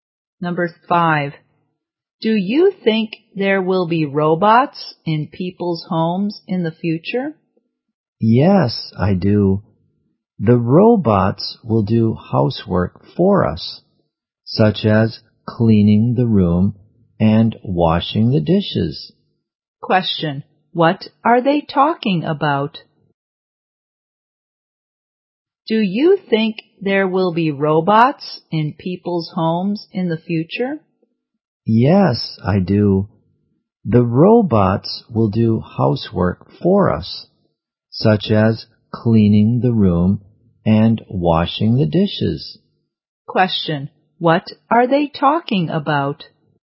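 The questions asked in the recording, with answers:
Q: what are they talking about?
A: Robots in people's homes in the future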